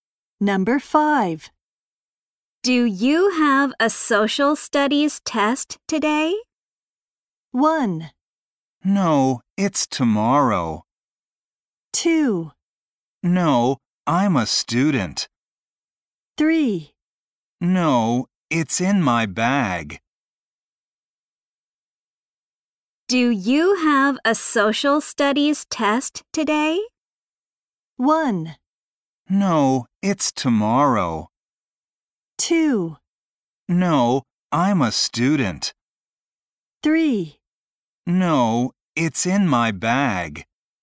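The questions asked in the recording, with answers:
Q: Do you have a social studies test today?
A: 1: No, it's tomorrow.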